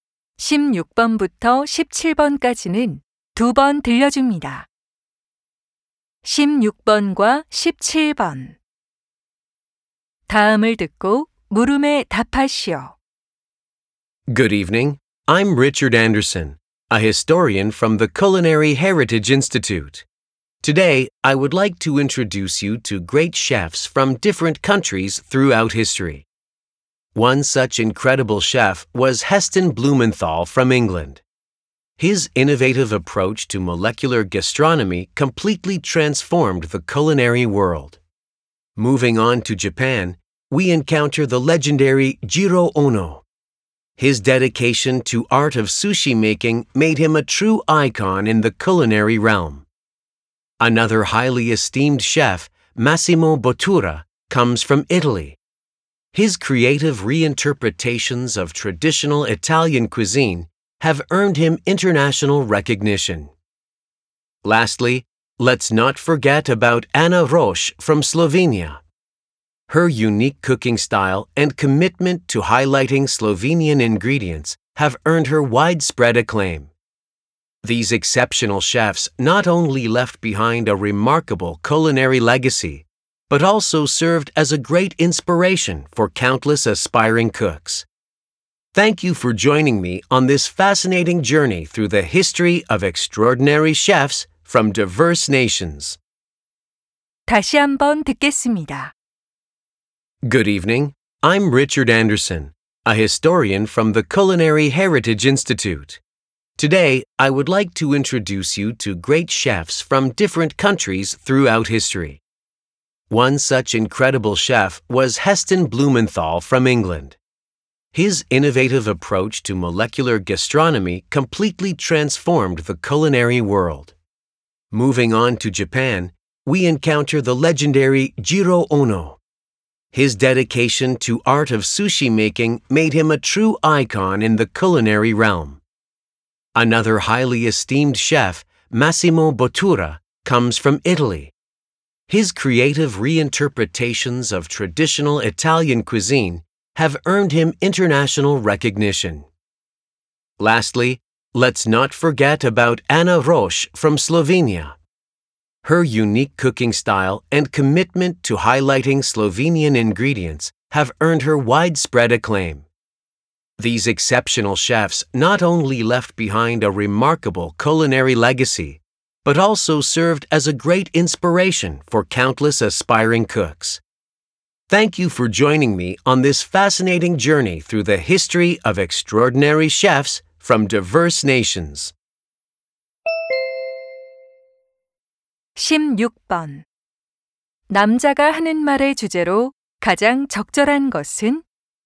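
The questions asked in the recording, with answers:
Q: 남자가 하는 말의 주제로 가장 적절한 것은?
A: 역사 속 여러 나라의 위대한 요리사들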